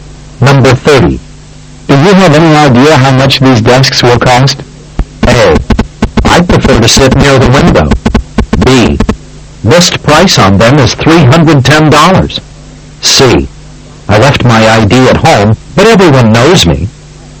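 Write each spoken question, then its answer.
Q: Do you have any idea how much these desks will cost?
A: B: List price on them is $310.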